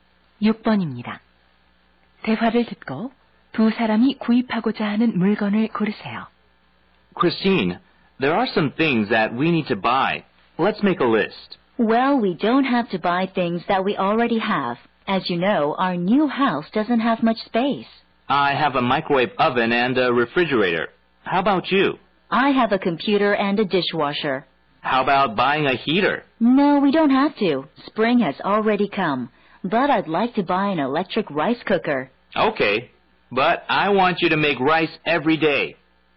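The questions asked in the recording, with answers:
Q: 대화를 듣고 두 사람이 구입하고자 하는 물건을 고르세요.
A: 전기밥솥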